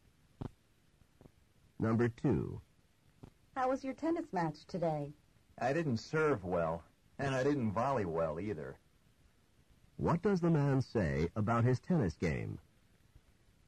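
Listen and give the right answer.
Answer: He served and volleyed badly.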